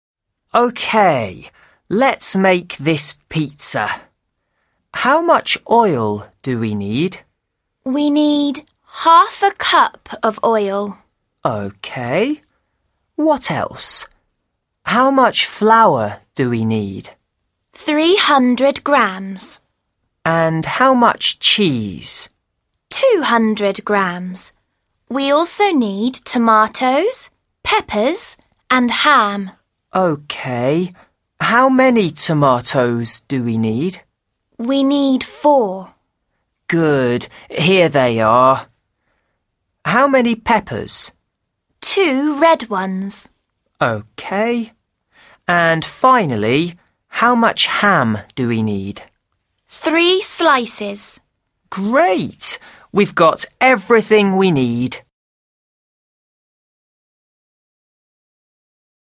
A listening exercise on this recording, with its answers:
5. Complete the dialogue with How much or how many. Then listen and check.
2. OK. What else? 2) _____ flour do we need?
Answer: How much

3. And 3) _____ cheese?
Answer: how much

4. OK. 4) _____ tomatoes do we need?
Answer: How many

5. Good. Here they are. 5) _____ peppers?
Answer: How many

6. OK. And finally, 6) _____ ham do we need?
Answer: how much

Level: A1